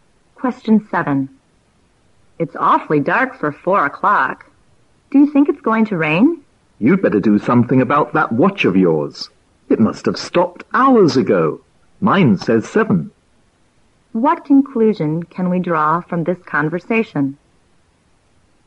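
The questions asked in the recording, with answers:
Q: What conclusion can we draw from this conversation?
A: The first speaker's watch has stopped; it is actually about 7 o'clock, not 4.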